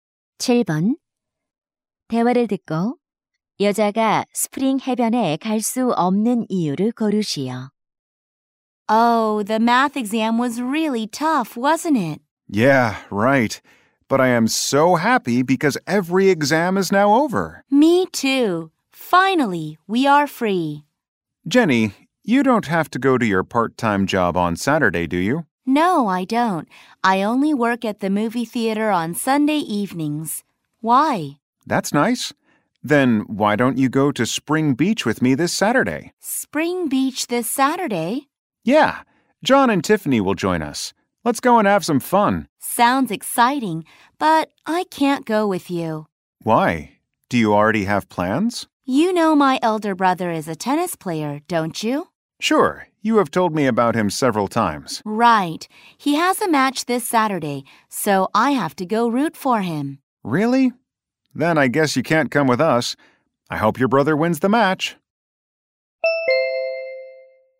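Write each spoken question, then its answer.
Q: 대화를 듣고 여자가 스프링 해변에 갈 수 없는 이유를 고르시오.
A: 오빠의 테니스 경기를 응원하러 가야 해서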